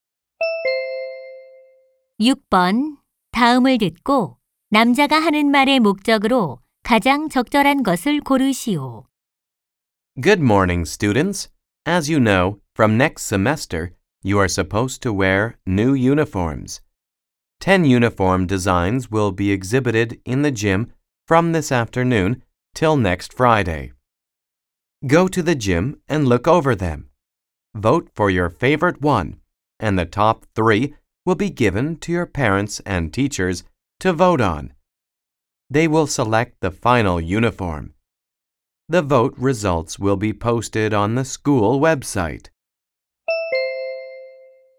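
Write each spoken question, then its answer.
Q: 다음을 듣고 남자가 하는 말의 목적으로 가장 적절한 것을 고르시오.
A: 새 교복 디자인 투표 참여 안내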